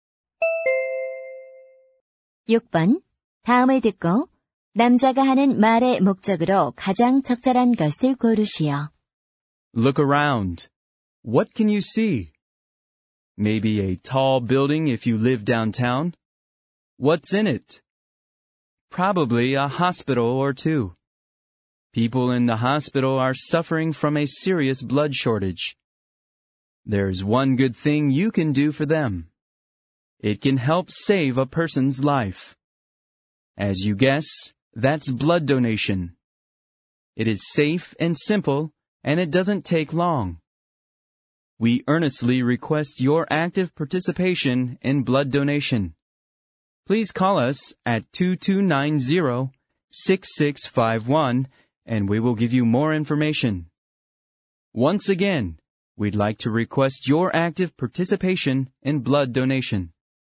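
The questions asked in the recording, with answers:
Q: 다음을 듣고 남자가 하는 말의 목적으로 가장 적절한 것을 고르시오.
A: 헌혈 참여 독려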